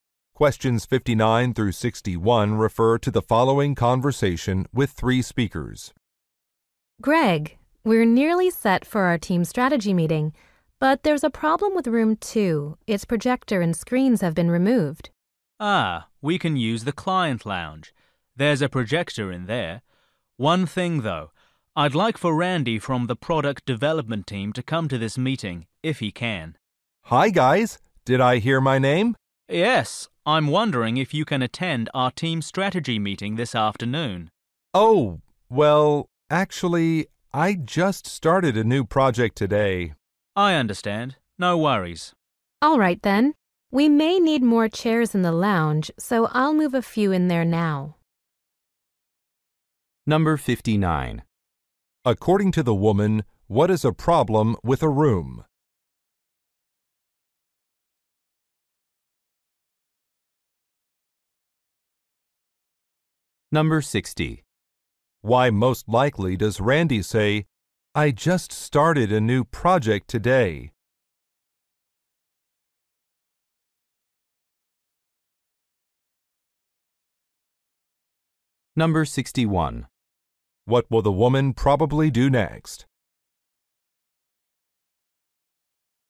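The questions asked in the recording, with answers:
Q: According to the woman, what is a problem with a room?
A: Its projector and screens have been removed

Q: Why most likely does Randy say, "I just started a new project today"?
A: To say he can't attend the meeting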